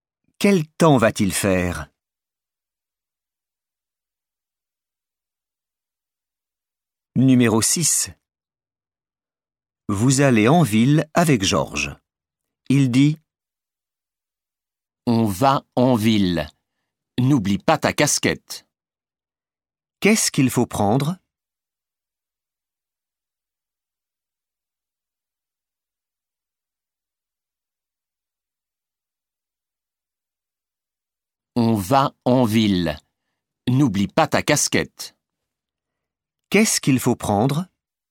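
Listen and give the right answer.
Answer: sa casquette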